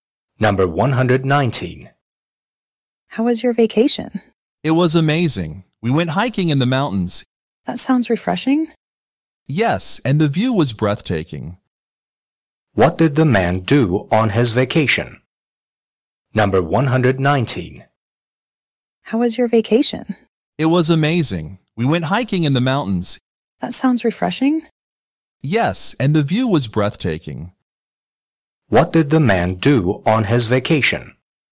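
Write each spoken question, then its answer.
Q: What did the man do on his vacation?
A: He went hiking in the mountains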